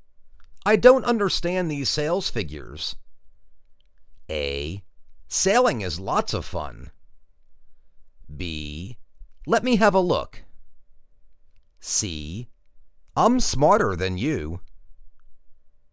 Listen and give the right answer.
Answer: Let me have a look.